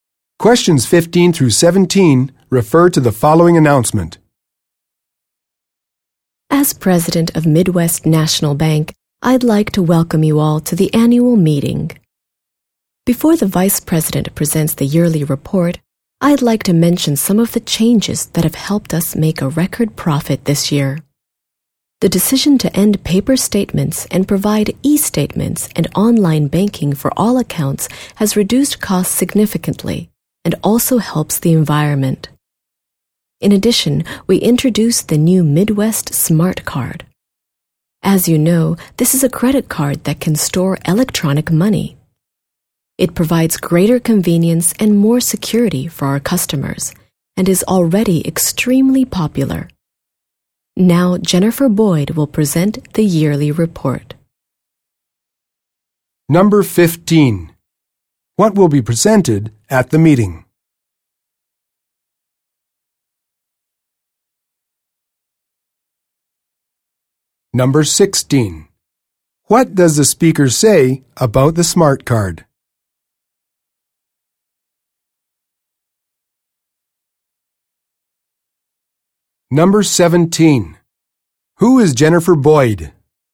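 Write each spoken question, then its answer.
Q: What will be presented at the meeting?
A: The yearly report

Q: What does the speaker say about the smart card?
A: It is already extremely popular

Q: Who is Jennifer Boyd?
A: The bank's Vice President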